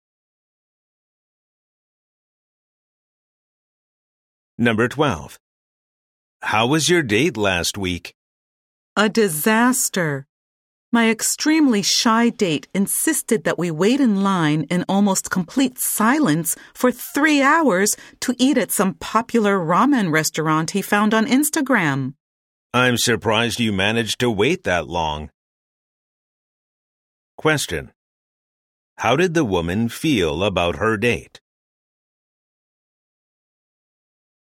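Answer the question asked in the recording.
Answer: She thought it was a disaster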